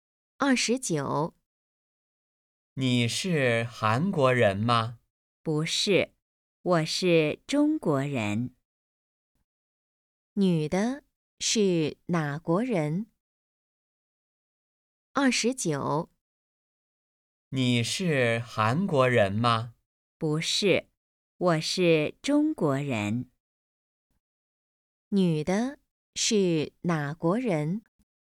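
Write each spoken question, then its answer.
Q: 女的是哪国人?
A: 中国人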